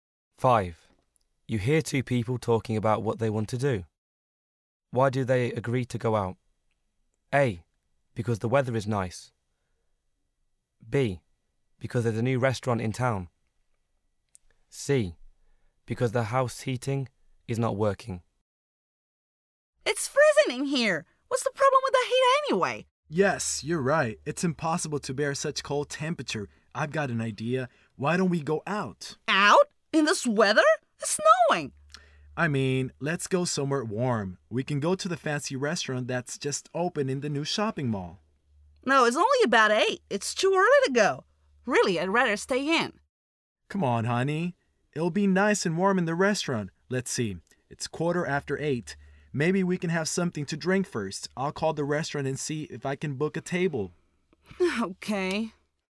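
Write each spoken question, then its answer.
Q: Why do they agree to go out?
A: C: Because the house heating is not working.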